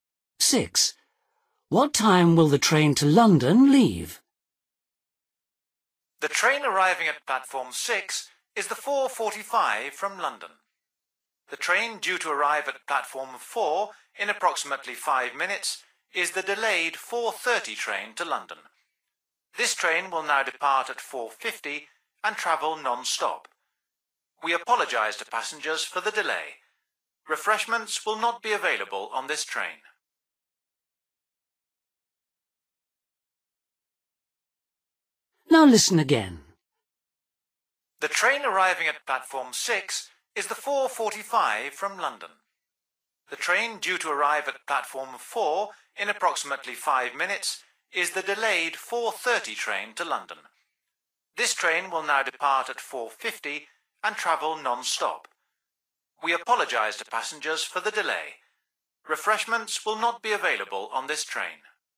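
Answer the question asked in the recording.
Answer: 4:50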